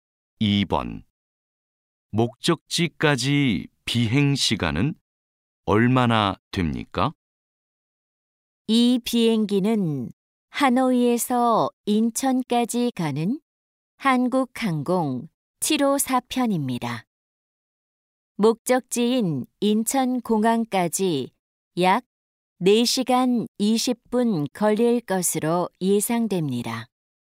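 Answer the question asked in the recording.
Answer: 약 4시간 20분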